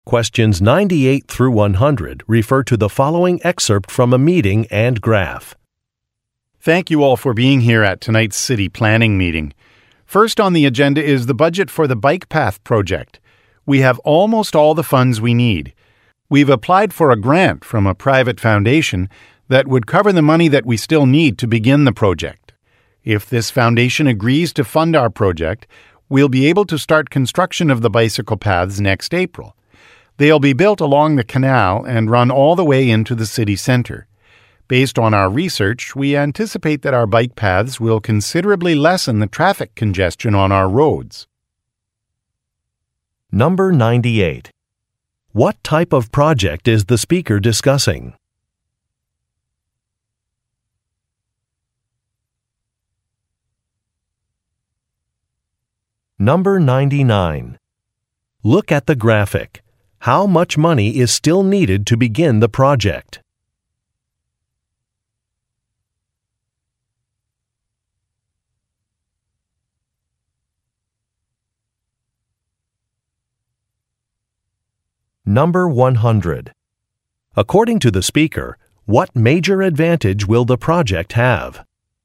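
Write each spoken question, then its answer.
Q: What type of project is the speaker discussing?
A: A bike path project

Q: According to the speaker, what major advantage will the project have?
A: It will reduce traffic congestion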